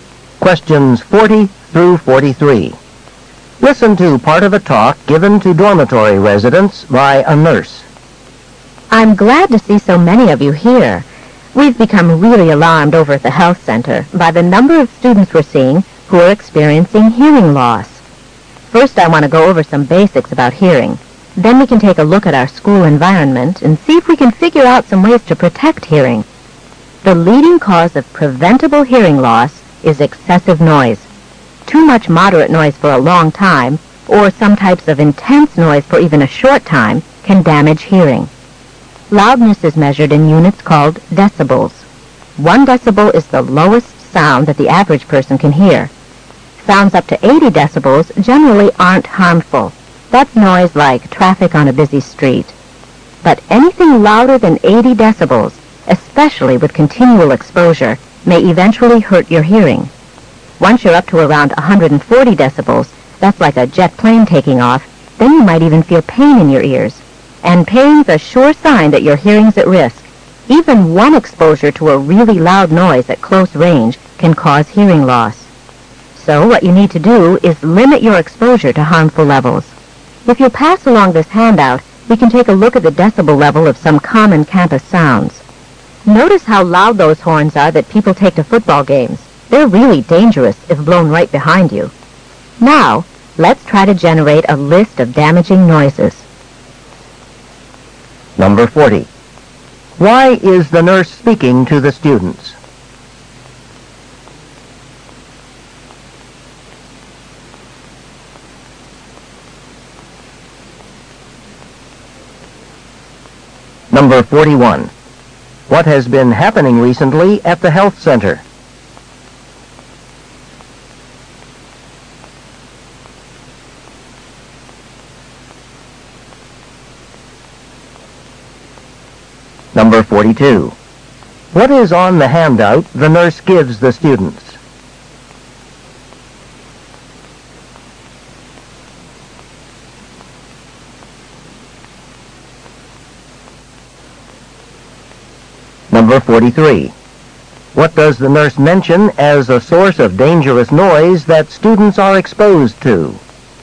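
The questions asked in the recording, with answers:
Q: Why is the nurse speaking to the students?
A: To discuss protecting hearing from noise

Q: What has been happening recently at the health center?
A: Many students have come in with hearing loss

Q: What is on the handout the nurse gives the students?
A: Decibel levels of common campus sounds

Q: What does the nurse mention as a source of dangerous noise that students are exposed to?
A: Horns at football games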